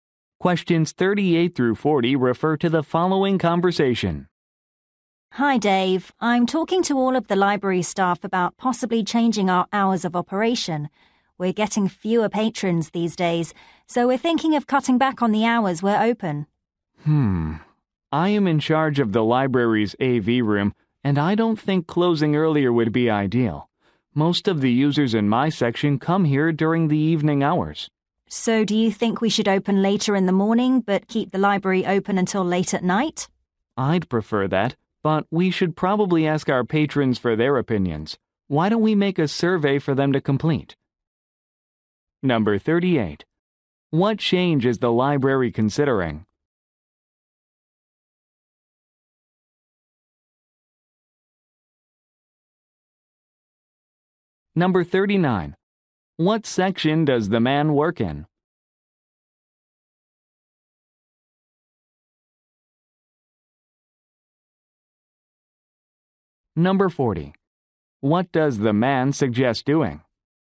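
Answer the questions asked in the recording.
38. Changing (cutting back) its hours of operation
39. The AV room
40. Making a survey for patrons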